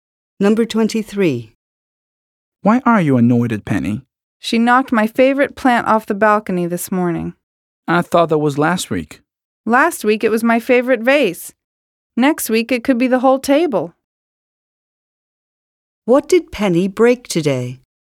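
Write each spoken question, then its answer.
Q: What did Penny break today?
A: A plant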